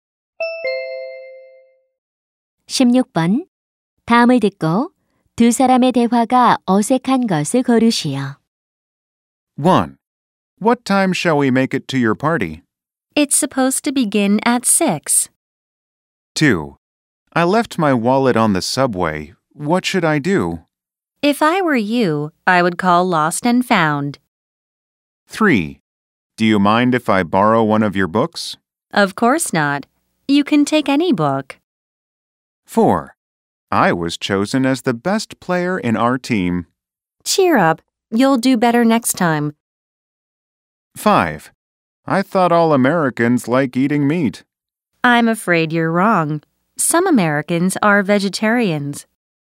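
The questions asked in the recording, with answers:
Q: 다음을 듣고 두 사람의 대화가 어색한 것을 고르시오.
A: 4: I was chosen as the best player in our team. / Cheer up. You'll do better next time.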